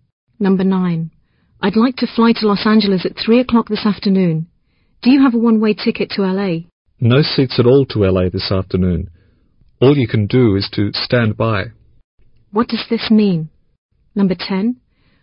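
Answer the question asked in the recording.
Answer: The flight is full; he must wait in case a seat becomes free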